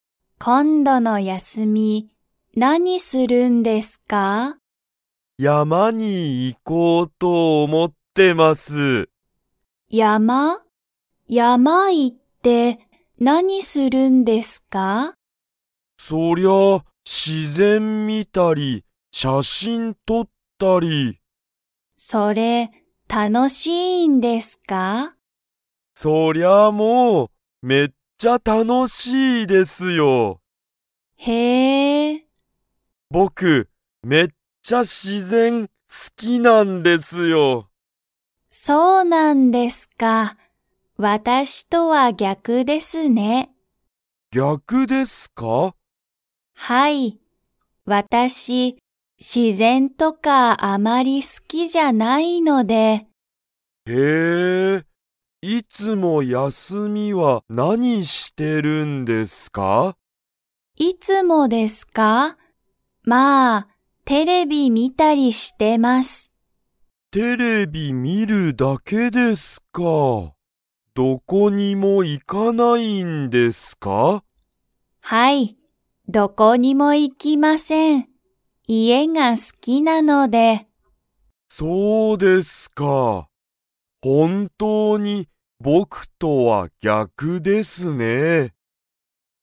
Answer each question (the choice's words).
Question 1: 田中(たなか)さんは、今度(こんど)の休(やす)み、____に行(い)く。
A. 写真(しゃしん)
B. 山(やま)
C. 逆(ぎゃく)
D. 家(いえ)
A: 山(やま)

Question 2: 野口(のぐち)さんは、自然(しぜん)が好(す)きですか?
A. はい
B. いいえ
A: いいえ

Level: Level 2